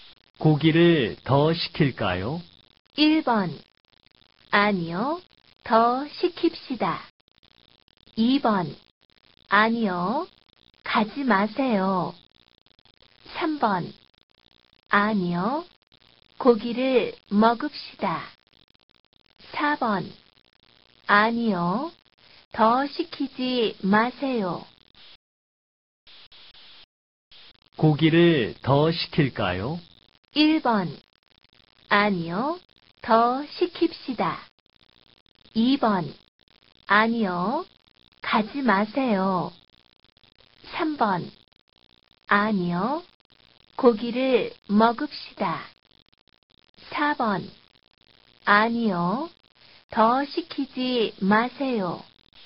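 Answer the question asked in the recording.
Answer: 4: 아니요. 더 시키지 마세요.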